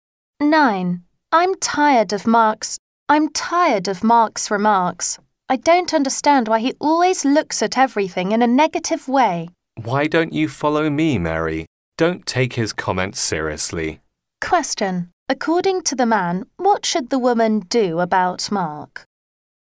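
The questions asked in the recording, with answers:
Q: According to the man, what should the woman do about Mark?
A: Ignore his comments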